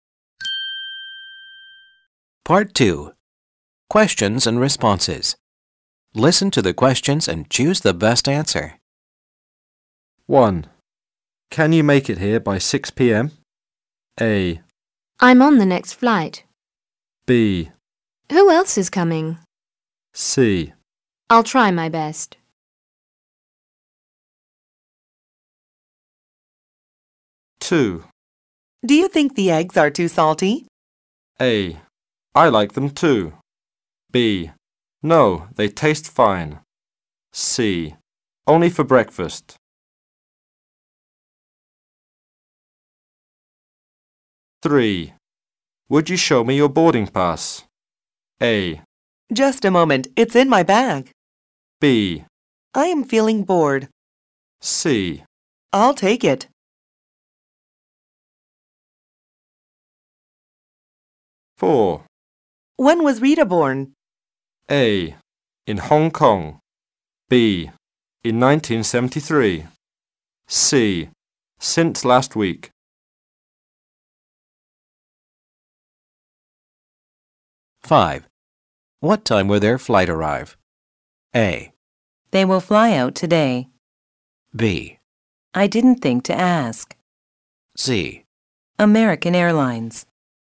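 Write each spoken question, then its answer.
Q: Can you make it here by 6 p.m.?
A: C: I'll try my best.

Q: Do you think the eggs are too salty?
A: B: No, they taste fine.

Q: Would you show me your boarding pass?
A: A: Just a moment, it's in my bag.

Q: When was Rita born?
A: B: In 1973.

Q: What time will their flight arrive?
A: B: I didn't think to ask.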